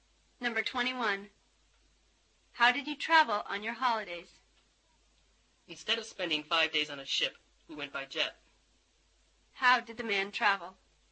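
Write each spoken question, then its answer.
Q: How did the man travel?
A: By jet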